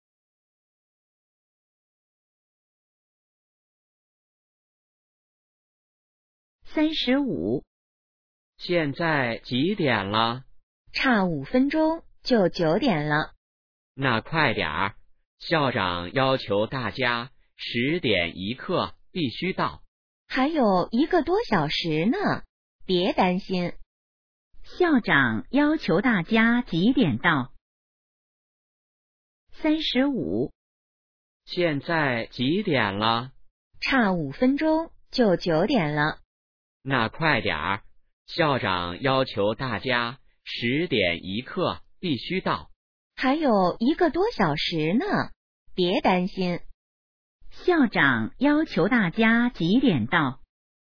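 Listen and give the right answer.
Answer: 10点1刻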